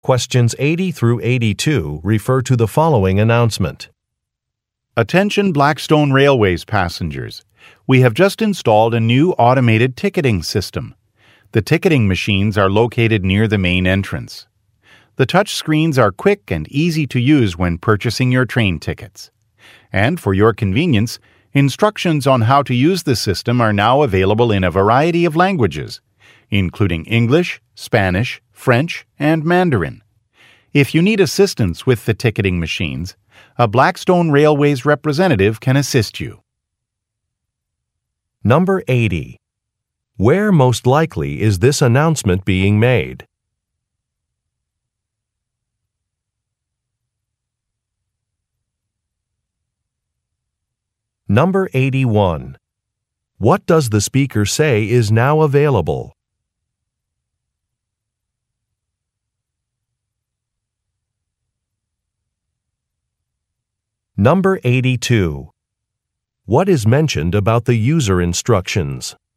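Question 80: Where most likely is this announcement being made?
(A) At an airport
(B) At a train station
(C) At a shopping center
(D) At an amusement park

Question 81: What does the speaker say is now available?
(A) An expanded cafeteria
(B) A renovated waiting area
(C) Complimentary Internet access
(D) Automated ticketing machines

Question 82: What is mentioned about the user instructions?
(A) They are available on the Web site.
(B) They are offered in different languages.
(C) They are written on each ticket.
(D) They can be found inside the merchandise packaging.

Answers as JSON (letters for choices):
{"80": "B", "81": "D", "82": "B"}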